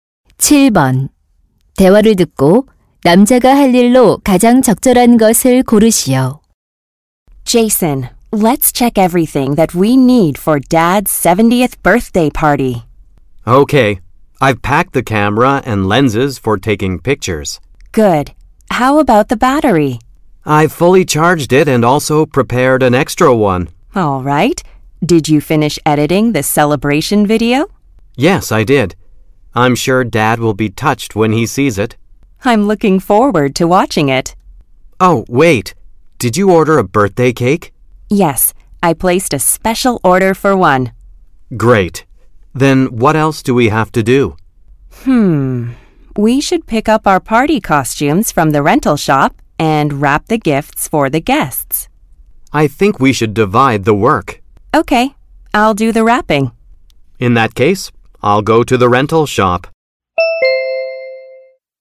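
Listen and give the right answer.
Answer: 대여점에서 파티 의상 찾아오기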